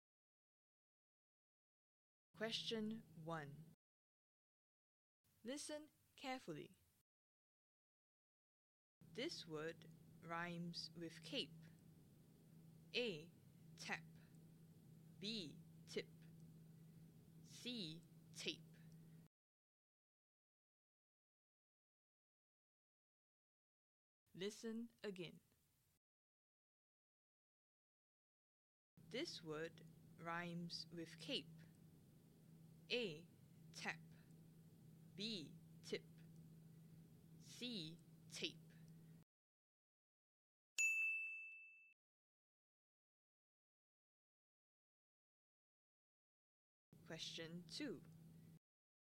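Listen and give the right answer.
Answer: C: Tape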